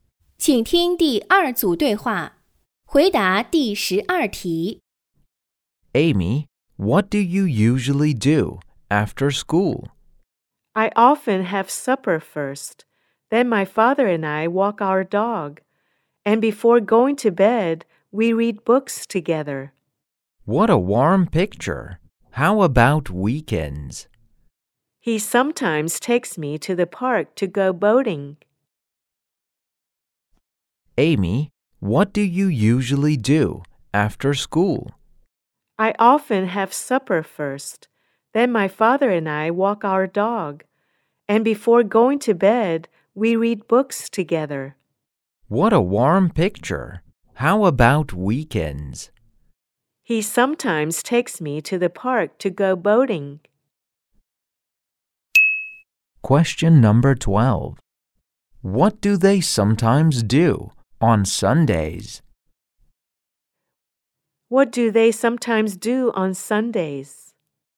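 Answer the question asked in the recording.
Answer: They go boating in the park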